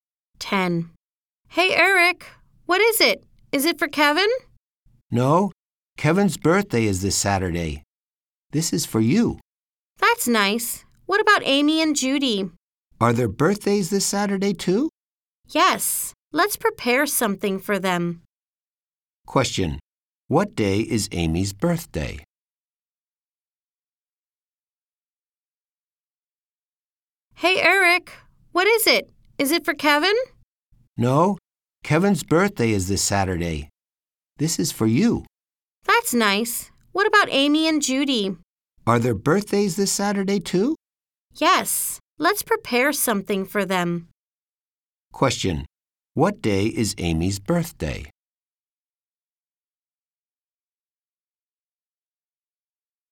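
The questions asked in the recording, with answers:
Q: What day is Amy's birthday?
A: This Saturday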